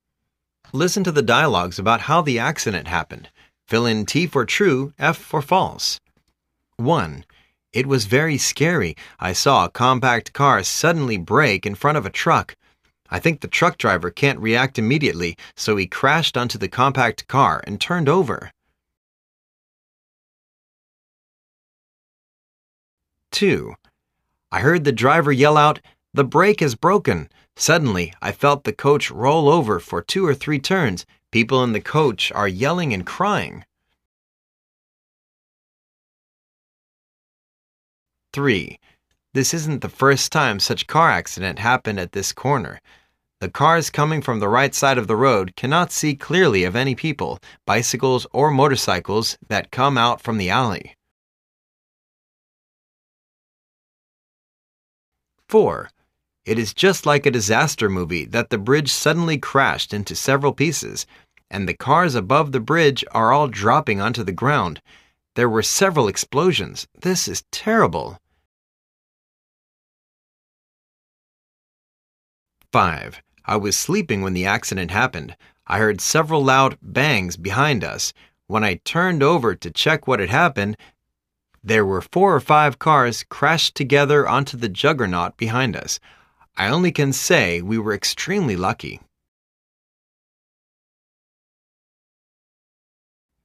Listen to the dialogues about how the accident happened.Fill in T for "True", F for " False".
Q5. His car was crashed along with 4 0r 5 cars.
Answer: F

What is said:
1.It was very scary. I saw a compact car suddenly break in front of a truck. I think the truck driver can't react immediately so he crashed onto the compact car and turned over.
2.I heard the driver yell out: "the break has brokenl"Suddenly, I felt the coach roll over for two or three turns.People in the coach are yelling and crying.
3.This isn't the first time such car accident happened at this corner. The cars coming from the right side of the road cannot see clearly of any people, bicycles or motorcycles that come out from the alley.
4.It is just like a disaster movie that the bridge suddenly crashed into several pieces. And, the cars above the bridge are all dropping onto the ground. There were several explosions_This is terrible.
5.I was sleeping when the accident happened. I heard several loud 'Bang' behind us. When I turn over to check what had happened, there were 4 0r 5 cars crashed together onto the juggernaut behind us. I only can say we were extremely lucky.